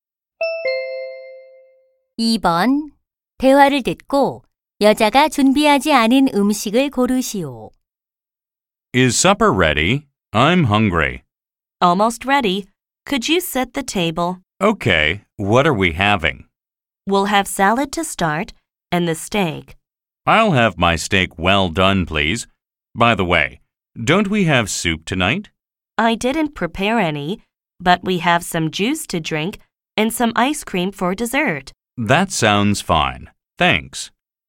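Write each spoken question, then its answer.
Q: 대화를 듣고 여자가 준비하지 않은 음식을 고르시오.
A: 수프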